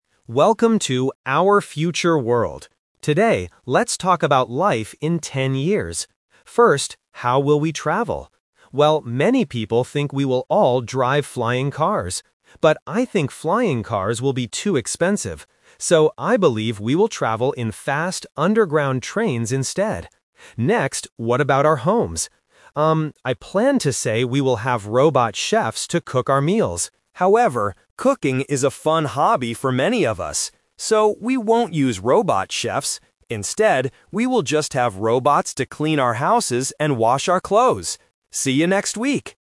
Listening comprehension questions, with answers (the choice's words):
Listen to the podcast host talking about the future and choose the correct answer (A, B, or C) for each question.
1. How does the host believe we will travel in ten years?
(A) In flying cars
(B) In underground trains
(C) In electric buses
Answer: In underground trains

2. What will robots do in our homes?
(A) Cook our meals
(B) Clean our houses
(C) Feed our pets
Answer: Clean our houses

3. Why won't people use robot chefs?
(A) Because cooking is a fun hobby.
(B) Because robots are too expensive.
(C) Because robots make bad food.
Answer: Because cooking is a fun hobby.

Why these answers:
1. The host mentions flying cars first (The Trap), but he uses the word "But" to say they will be too expensive. He uses "So" to give his real prediction: "we will travel in fast underground trains instead." Electric buses are not mentioned.
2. The host says he planned to say we will have robot chefs to cook our meals (The Trap). However, he changes his mind. He says we will have robots to "clean our houses and wash our clothes." Feeding pets is a plausible robot task, but it is not mentioned.
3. The host clearly states that "cooking is a fun hobby for many of us." Option B (too expensive) is a trap because "expensive" is the reason people won't use flying cars, not robot chefs. Option C (make bad food) is not mentioned in the audio.

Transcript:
Host: Welcome to "Our Future World"! Today, let's talk about life in ten years. First, how will we travel? Well, many people think we will all drive flying cars. But, I think flying cars will be too expensive. So, I believe we will travel in fast underground trains instead.
Next, what about our homes? Um, I planned to say we will have robot chefs to cook our meals. However, cooking is a fun hobby for many of us. So, we won't use robot chefs. Instead, we will just have robots to clean our houses and wash our clothes. See you next week!

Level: A2